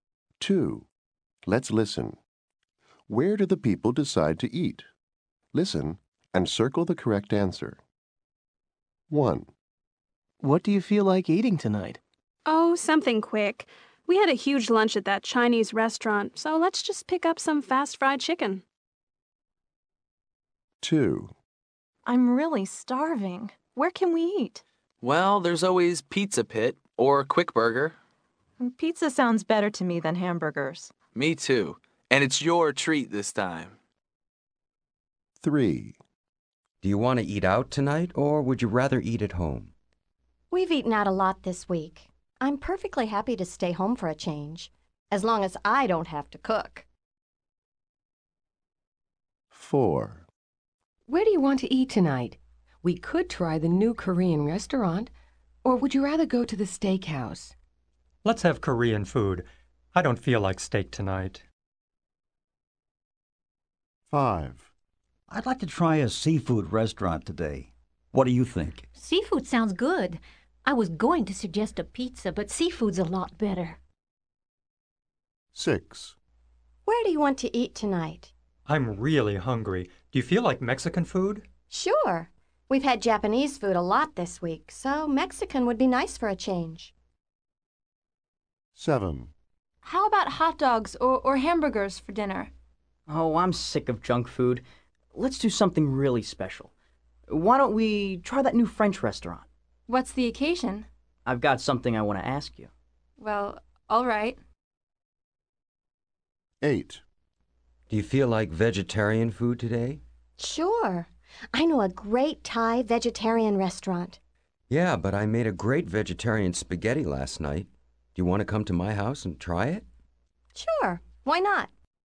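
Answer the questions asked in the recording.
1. A fast fried chicken place
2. Pizza Pit
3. At home
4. The new Korean restaurant
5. A seafood restaurant
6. A Mexican restaurant
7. The new French restaurant
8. At the speaker's house (vegetarian spaghetti)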